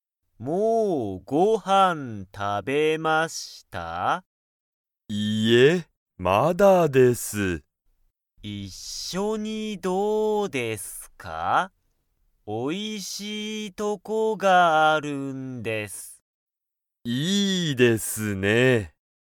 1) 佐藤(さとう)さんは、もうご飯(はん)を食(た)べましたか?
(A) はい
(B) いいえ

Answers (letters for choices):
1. B

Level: Level 1